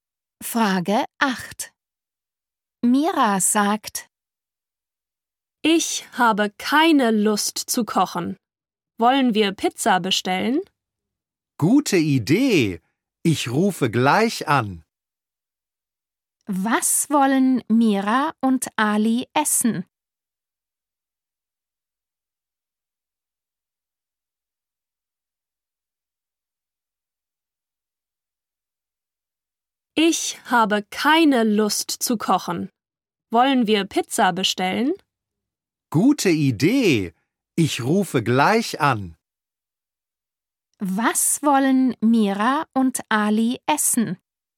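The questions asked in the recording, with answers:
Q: Was wollen Mira und Ali essen?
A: Pizza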